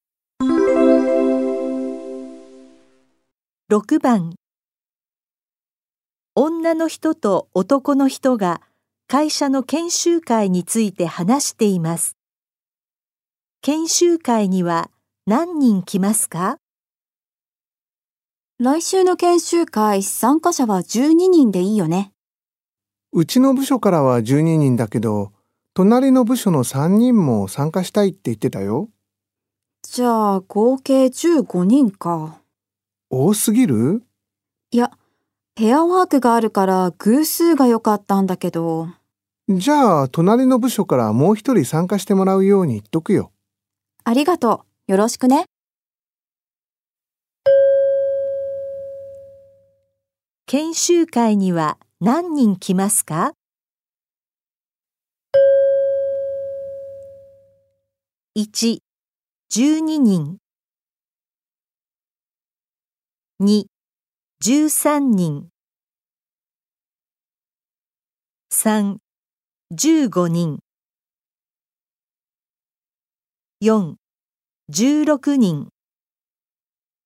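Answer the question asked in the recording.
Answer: 4: 16人。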